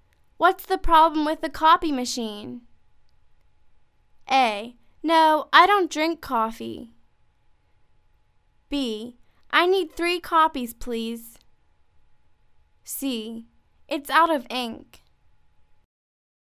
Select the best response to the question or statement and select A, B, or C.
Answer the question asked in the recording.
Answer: It's out of ink.